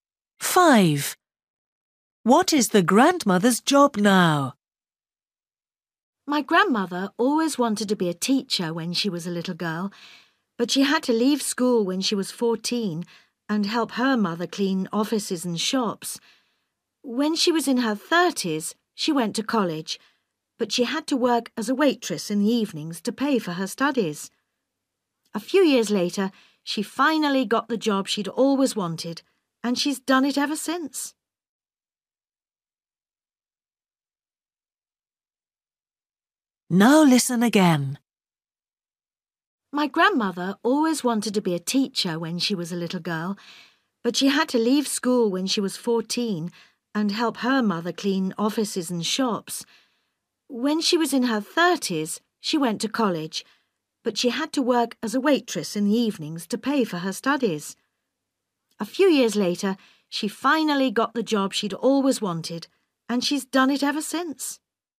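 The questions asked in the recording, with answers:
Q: What is the grandmother's job now?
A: teacher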